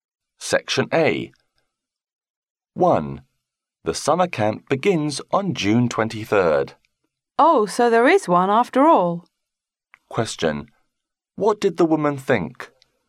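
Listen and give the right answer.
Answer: That there was no summer camp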